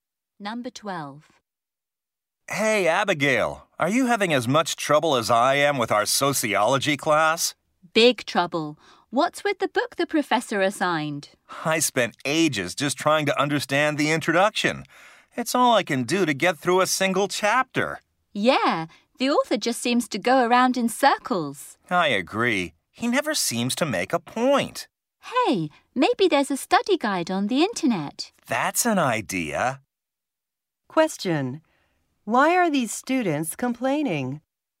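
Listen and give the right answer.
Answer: Their assigned sociology book is hard to understand.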